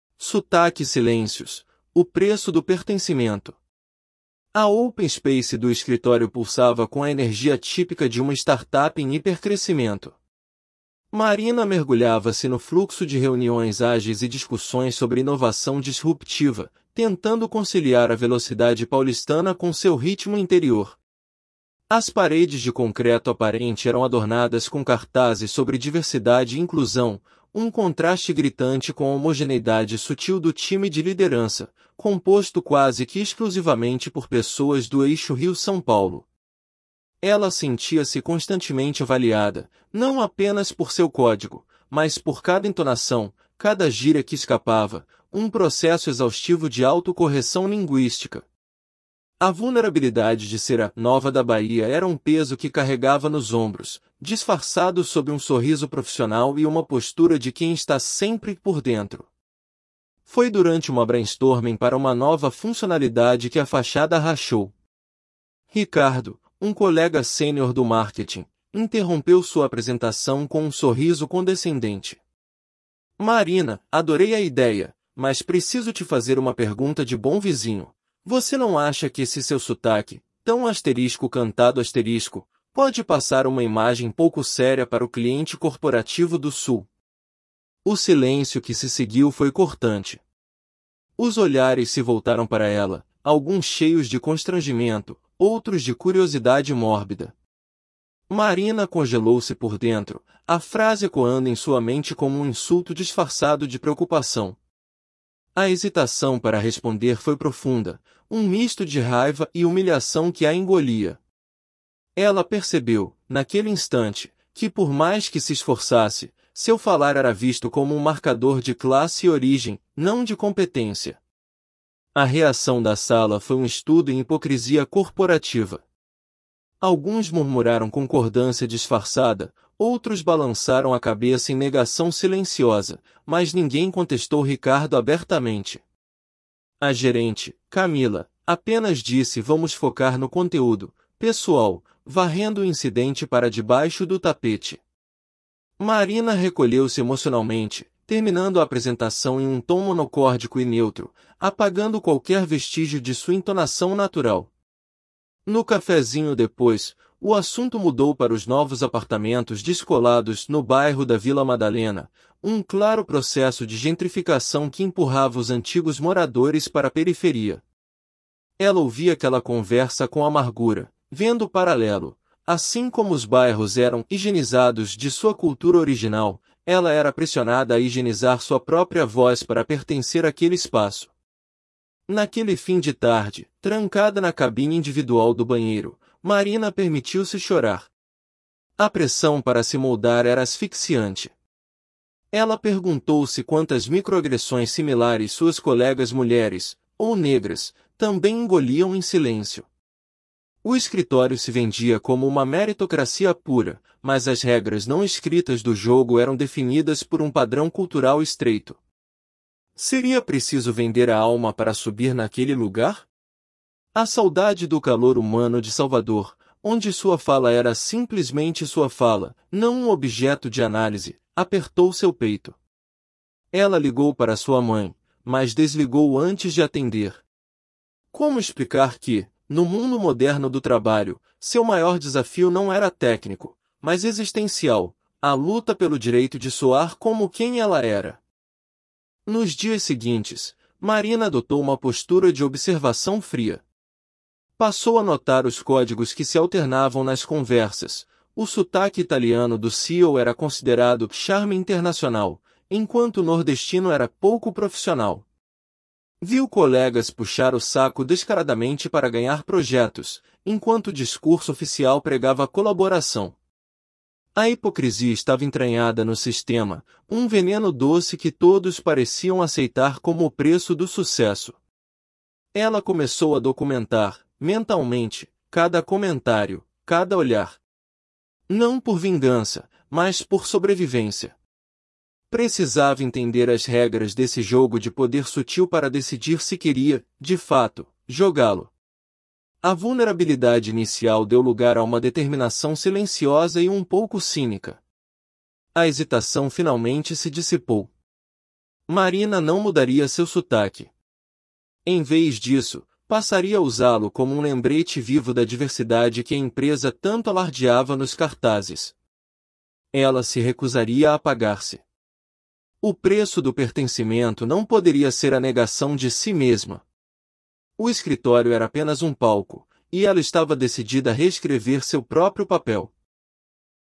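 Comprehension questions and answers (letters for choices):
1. Como o ambiente da startup, apesar de se promover como diverso, contradiz essa imagem através de sua dinâmica interna?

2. Por que o comentário de Ricardo durante o brainstorm é descrito como 'um insulto disfarçado de preocupação'?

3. Qual é o significado mais profundo da reação da gerente Camila ('Vamos focar no conteúdo') após o incidente?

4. Como Marina estabelece um paralelo entre a gentrificação do bairro e sua própria experiência no escritório?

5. Por que a hesitação de Marina para responder ao comentário de Ricardo é descrita como 'um misto de raiva e humilhação'?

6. Qual é a mudança fundamental na postura de Marina nos dias seguintes ao incidente, e qual seu objetivo final?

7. Qual é o principal conflito interno vivido por Marina no ambiente corporativo?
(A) A dificuldade em acompanhar a velocidade das reuniões ágeis.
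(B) A pressão para negar sua identidade cultural (sotaque, origem) para se encaixar.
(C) A falta de competência técnica para lidar com inovação disruptiva.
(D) A saudade de sua família em Salvador.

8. O que o silêncio e as reações dos colegas após o comentário de Ricardo revelam sobre a cultura da empresa?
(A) Um ambiente de colaboração e apoio mútuo.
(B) Uma meritocracia onde apenas o trabalho duro é valorizado.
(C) Uma hipocrisia enraizada, onde microagressões não são contestadas abertamente.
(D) Um desinteresse geral pelos problemas interpessoais.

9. Qual é a ironia percebida por Marina em relação ao tratamento dos diferentes sotaques no escritório?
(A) Todos os sotaques regionais são igualmente desvalorizados.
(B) O sotaque italiano do CEO é visto como 'charme internacional', enquanto o nordestino dela é visto como 'pouco profissional'.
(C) A empresa oferece aulas para uniformizar o sotaque de todos os funcionários.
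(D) Nenhum sotaque é percebido ou comentado.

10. O que a decisão final de Marina ('não mudaria seu sotaque') simboliza?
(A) Uma rendição e aceitação de que não pertence àquele lugar.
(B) Um ato de resistência e afirmação do direito à sua identidade cultural.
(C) Um plano para processar a empresa por discriminação.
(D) Um desejo de provocar seus colegas intencionalmente.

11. Como a 'vulnerabilidade' inicial de Marina se transforma ao longo da narrativa?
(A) Permanece a mesma, levando-a a pedir demissão.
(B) Transforma-se em indiferença total em relação ao trabalho.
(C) Dá lugar a uma determinação silenciosa de entender e navegar nas regras do jogo de poder.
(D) Transforma-se em uma agressividade aberta contra os colegas.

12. Qual é a crítica central que a história faz sobre o conceito de 'meritocracia' nesse ambiente?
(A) Que a meritocracia não existe em lugar nenhum.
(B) Que a meritocracia é pura, mas Marina não é suficientemente competente.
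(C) Que a meritocracia professada é uma fachada, pois as regras não escritas do sucesso são definidas por um padrão cultural estreito e excludente.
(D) Que a meritocracia só funciona em empresas tradicionais, não em startups.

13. Marina sente que é avaliada apenas pela qualidade do seu código, e não por características pessoais.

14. A conversa no 'cafézinho' sobre apartamentos na Vila Madalena serve como um gatilho para Marina perceber um paralelo entre gentrificação urbana e a pressão para apagar sua identidade no trabalho.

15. Marina decide que, para ter sucesso, precisa 'vender a alma' e adotar completamente o padrão cultural dominante do escritório.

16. O processo de 'auto-correção linguística' de Marina é descrito como algo leve e natural para ela.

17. A motivação de Marina para começar a documentar mentalmente os comportamentos hipócritas é puramente vingativa.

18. A história sugere que o 'pertencimento' verdadeiro em um ambiente tóxico exige a negação de aspectos fundamentais da própria identidade.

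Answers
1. Os cartazes sobre diversidade contrastam com a liderança homogênea, quase toda do eixo Rio-São Paulo.
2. Porque ele fingia se preocupar com a imagem para o cliente, mas desvalorizava o sotaque dela como pouco sério.
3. Ela varreu o incidente para debaixo do tapete, mostrando a hipocrisia corporativa.
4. Assim como os bairros eram higienizados de sua cultura original, ela era pressionada a higienizar sua própria voz.
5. Porque percebeu que seu falar era visto como marcador de classe e origem, não de competência.
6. Adotou uma postura de observação fria para entender as regras do jogo de poder; decidiu não mudar seu sotaque.
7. B
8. C
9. B
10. B
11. C
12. C
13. Falso
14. Verdadeiro
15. Falso
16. Falso
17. Falso
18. Falso

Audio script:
Sotaque e Silêncios: O Preço do Pertencimento – TEST
A open space do escritório pulsava com a energia típica de uma startup em hipercrescimento. 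Marina mergulhava-se no fluxo de reuniões ágeis e discussões sobre inovação disruptiva, tentando conciliar a velocidade paulistana com seu ritmo interior. As paredes de concreto aparente eram adornadas com cartazes sobre diversidade e inclusão, um contraste gritante com a homogeneidade sutil do time de liderança, composto quase que exclusivamente por pessoas do eixo Rio-São Paulo. Ela sentia-se constantemente avaliada, não apenas por seu código, mas por cada entonação, cada gíria que escapava, um processo exaustivo de auto-correção linguística. A vulnerabilidade de ser a 'nova da Bahia' era um peso que carregava nos ombros, disfarçado sob um sorriso profissional e uma postura de quem está sempre 'por dentro'.
Foi durante uma brainstorm para uma nova funcionalidade que a fachada rachou. Ricardo, um colega sênior do marketing, interrompeu sua apresentação com um sorriso condescendente. 'Marina, adorei a ideia, mas preciso te fazer uma pergunta de bom vizinho: você não acha que esse seu sotaque... 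tão *cantado*... pode passar uma imagem pouco séria para o cliente corporativo do Sul?' O silêncio que se seguiu foi cortante. Os olhares se voltaram para ela, alguns cheios de constrangimento, outros de curiosidade mórbida. Marina congelou-se por dentro, a frase ecoando em sua mente como um insulto disfarçado de preocupação. A hesitação para responder foi profunda, um misto de raiva e humilhação que a engolia. Ela percebeu, naquele instante, que por mais que se esforçasse, seu falar era visto como um marcador de classe e origem, não de competência.
A reação da sala foi um estudo em hipocrisia corporativa. Alguns murmuraram concordância disfarçada, outros balançaram a cabeça em negação silenciosa, mas ninguém contestou Ricardo abertamente. A gerente, Camila, apenas disse 'Vamos focar no conteúdo, pessoal', varrendo o incidente para debaixo do tapete. Marina recolheu-se emocionalmente, terminando a apresentação em um tom monocórdico e neutro, apagando qualquer vestígio de sua entonação natural. 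No cafézinho depois, o assunto mudou para os novos apartamentos 'descolados' no bairro da Vila Madalena, um claro processo de gentrificação que empurrava os antigos moradores para a periferia. Ela ouvia aquela conversa com amargura, vendo o paralelo: assim como os bairros eram 'higienizados' de sua cultura original, ela era pressionada a higienizar sua própria voz para pertencer àquele espaço.
Naquele fim de tarde, trancada na cabine individual do banheiro, Marina permitiu-se chorar. A pressão para se moldar era asfixiante. Ela perguntou-se quantas microagressões similares suas colegas mulheres, ou negras, também engoliam em silêncio. O escritório se vendia como uma meritocracia pura, mas as regras não escritas do jogo eram definidas por um padrão cultural estreito. Seria preciso vender a alma para subir naquele lugar? A saudade do calor humano de Salvador, onde sua fala era simplesmente sua fala, não um objeto de análise, apertou seu peito. 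Ela ligou para sua mãe, mas desligou antes de atender. Como explicar que, no mundo moderno do trabalho, seu maior desafio não era técnico, mas existencial: a luta pelo direito de soar como quem ela era?
Nos dias seguintes, Marina adotou uma postura de observação fria. Passou a notar os códigos que se alternavam nas conversas: o sotaque italiano do CEO era considerado 'charme internacional', enquanto o nordestino era 'pouco profissional'. Viu colegas puxar o saco descaradamente para ganhar projetos, enquanto o discurso oficial pregava colaboração. A hipocrisia estava entranhada no sistema, um veneno doce que todos pareciam aceitar como o preço do sucesso. Ela começou a documentar, mentalmente, cada comentário, cada olhar. Não por vingança, mas por sobrevivência. Precisava entender as regras desse jogo de poder sutil para decidir se queria, de fato, jogá-lo. A vulnerabilidade inicial deu lugar a uma determinação silenciosa e um pouco cínica.
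A hesitação finalmente se dissipou. Marina não mudaria seu sotaque. Em vez disso, passaria a usá-lo como um lembrete vivo da diversidade que a empresa tanto alardeava nos cartazes. Ela se recusaria a apagar-se. O preço do pertencimento não poderia ser a negação de si mesma. O escritório era apenas um palco, e ela estava decidida a reescrever seu próprio papel.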